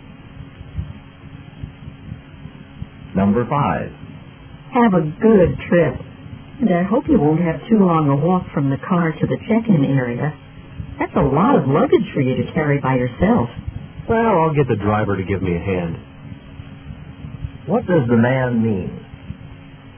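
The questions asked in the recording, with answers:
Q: What does the man mean?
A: The driver will help him carry his luggage.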